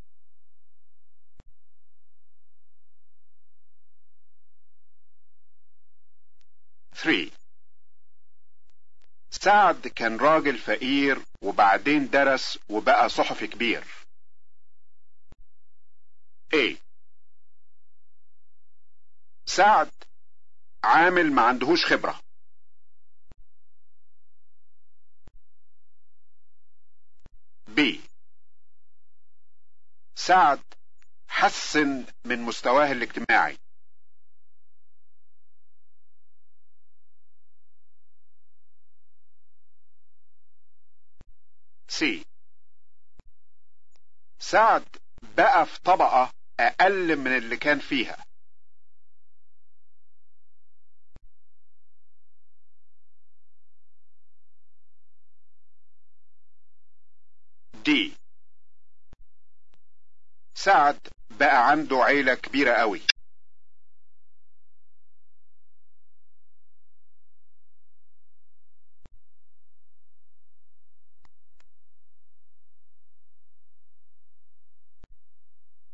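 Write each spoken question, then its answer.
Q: سعد كان راجل فقير وبعدين درس وبقى صحفي كبير.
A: B: سعد حسن من مستواه الاجتماعي.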